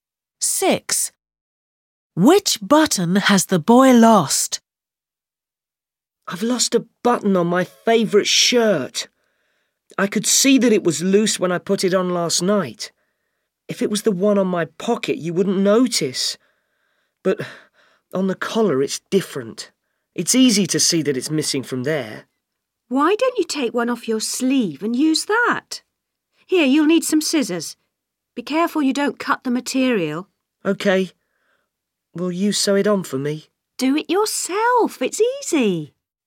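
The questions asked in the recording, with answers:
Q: Six. Which button has the boy lost?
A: the one on the collar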